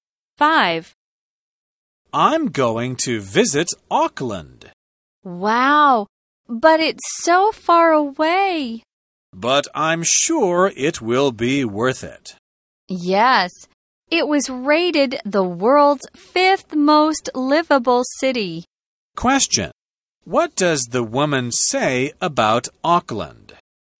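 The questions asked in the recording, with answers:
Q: What does the woman say about Auckland?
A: It was rated the world's 5th most livable city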